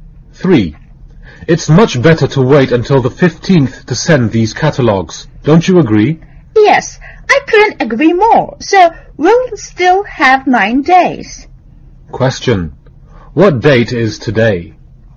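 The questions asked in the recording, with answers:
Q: What date is today?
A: The 6th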